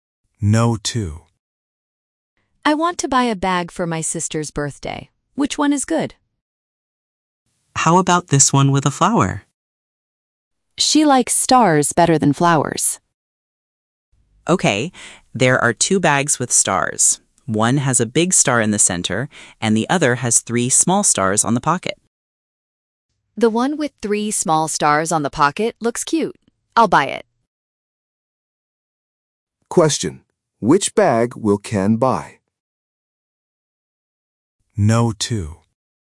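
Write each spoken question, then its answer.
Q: Which bag will Ken buy?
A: The bag with 3 small stars on the pocket.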